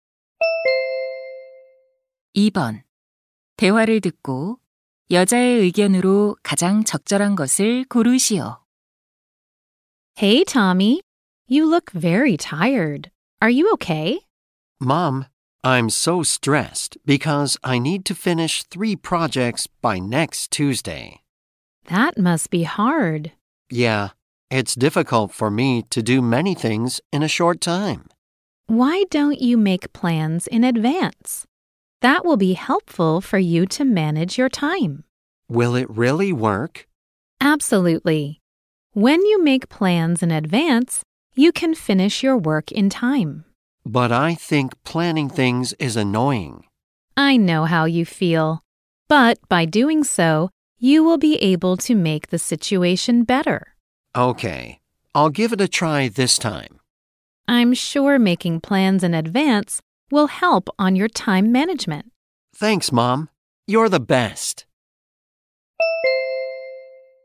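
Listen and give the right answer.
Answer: 미리 계획을 세우면 시간 관리에 도움이 된다.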